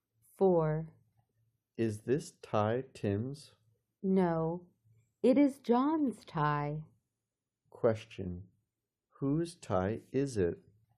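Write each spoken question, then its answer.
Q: Whose tie is it?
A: John's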